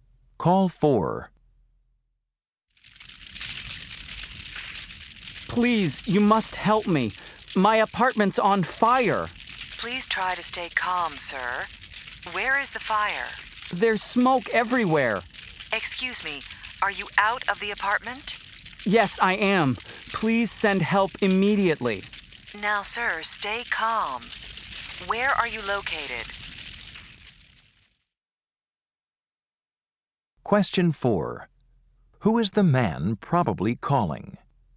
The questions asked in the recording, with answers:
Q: Who is the man probably calling?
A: Fire department.